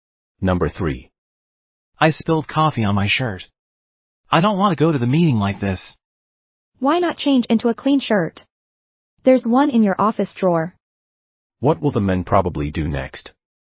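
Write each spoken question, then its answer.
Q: What will the men probably do next?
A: Change into the clean shirt in his office drawer.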